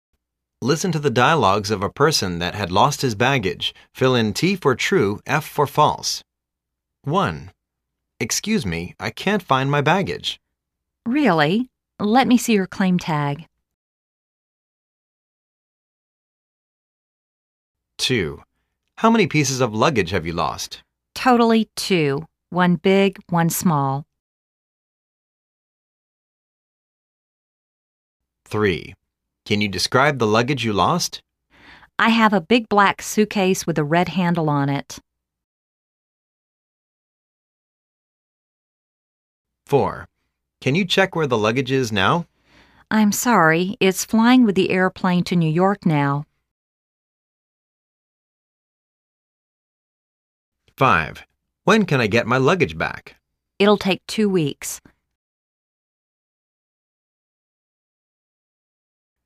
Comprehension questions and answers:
Listen to the dialogues of a person that had lost his baggage.Fill in T for "True", F for "False".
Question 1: The man lost his claim tag.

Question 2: The man has lost two luggage.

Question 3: The man's lost luggage is blue.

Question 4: The man lost his luggage in New York.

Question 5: The man can never take his lost luggage back.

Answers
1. F
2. T
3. F
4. F
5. F